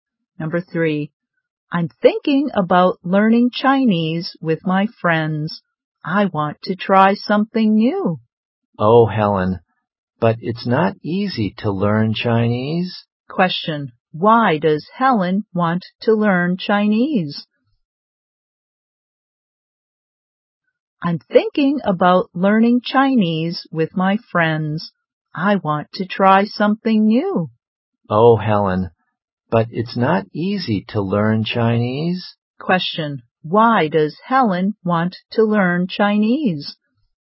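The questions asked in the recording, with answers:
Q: why does Helen want to learn Chinese?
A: She wants to try something new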